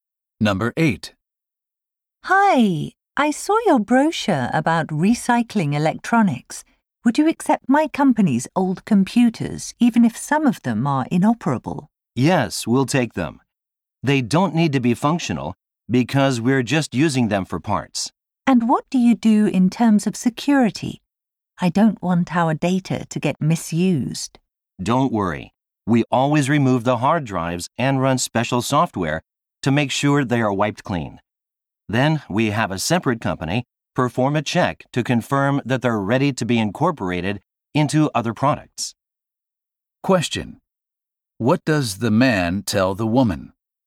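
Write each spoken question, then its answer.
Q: What does the man tell the woman?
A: The data on the computers will be completely wiped, and another company will check it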